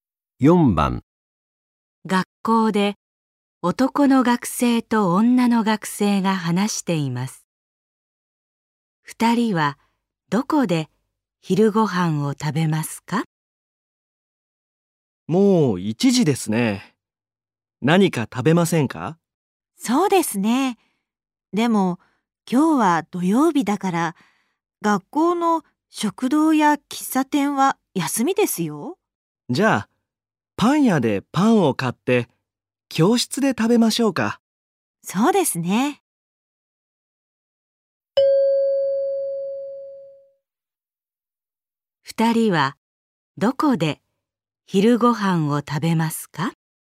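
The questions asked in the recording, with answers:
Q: 二人はどこで昼ご飯を食べますか?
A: 教室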